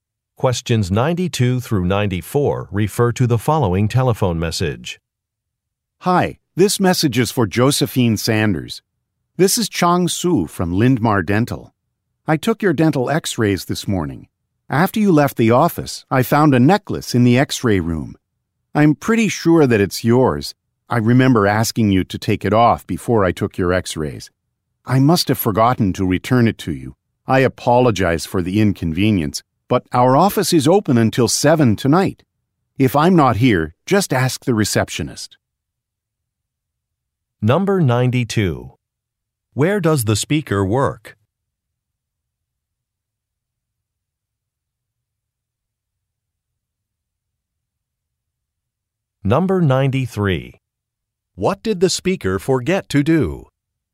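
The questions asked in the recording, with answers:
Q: Where does the speaker work?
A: At a dental office

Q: What did the speaker forget to do?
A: Return a necklace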